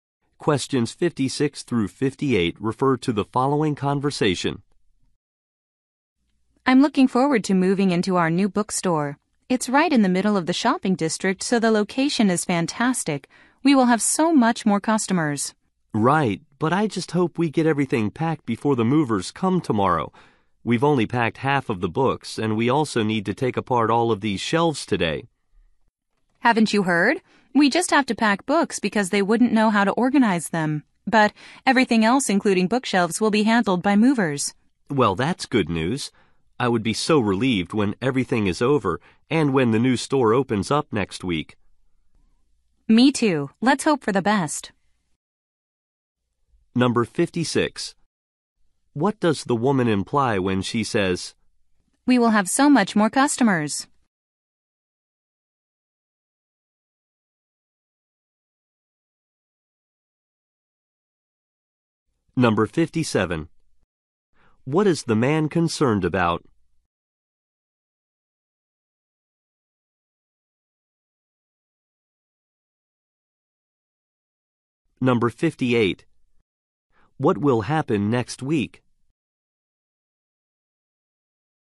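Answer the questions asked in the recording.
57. Packing everything before the movers come
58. The new store will open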